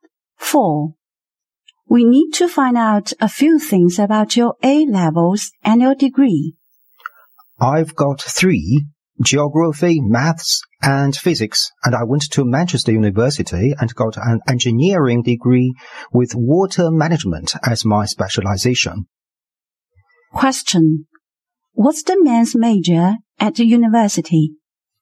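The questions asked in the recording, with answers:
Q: What's the man's major at the university?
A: Engineering, specializing in water management.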